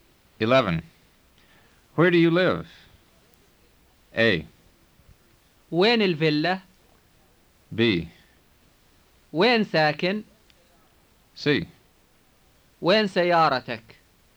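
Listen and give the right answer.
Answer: B: وين ساكن؟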